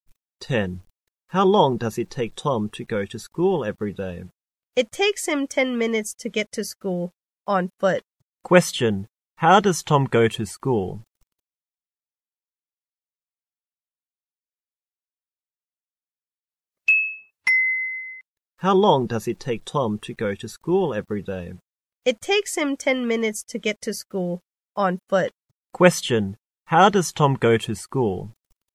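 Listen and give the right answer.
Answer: On foot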